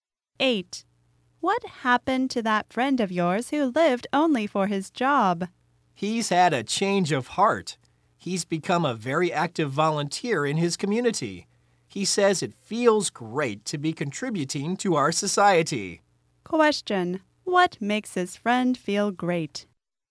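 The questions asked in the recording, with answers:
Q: what makes his friend feel great?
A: Contributing to society as a community volunteer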